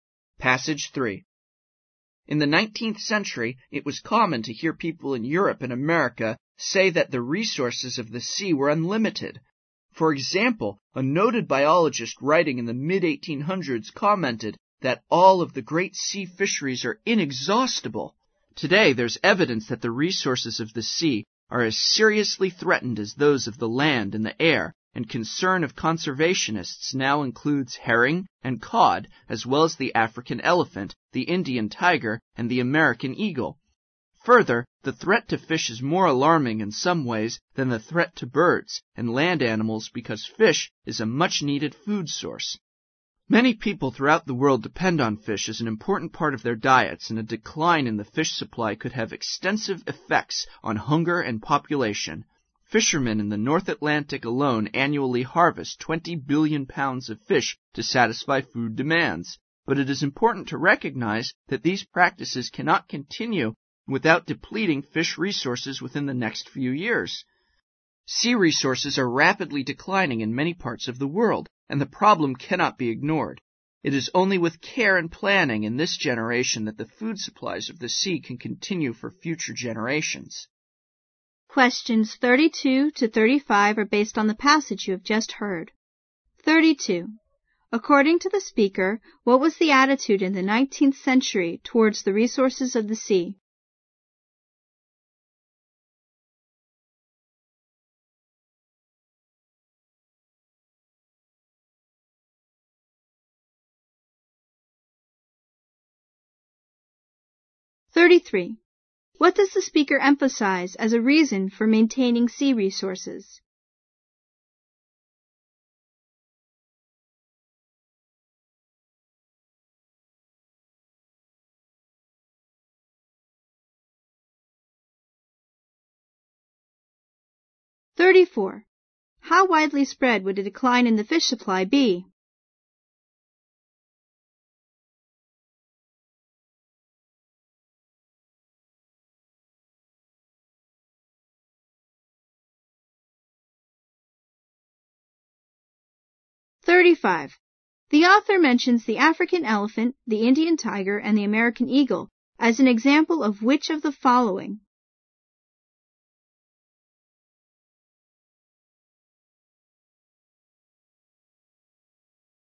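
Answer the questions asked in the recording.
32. They were thought to be unlimited
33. Fish is a much-needed food source
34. Worldwide
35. Threatened animals that conservationists are concerned about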